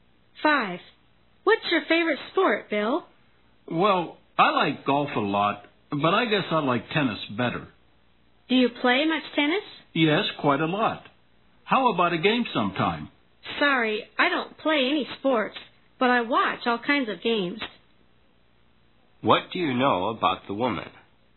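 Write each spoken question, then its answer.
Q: What do you know about the woman?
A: She doesn't play any sports but watches all kinds of games.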